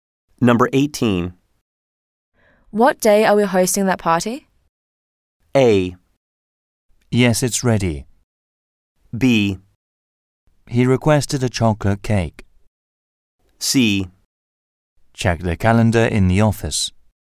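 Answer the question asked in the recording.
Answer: C: Check the calendar in the office.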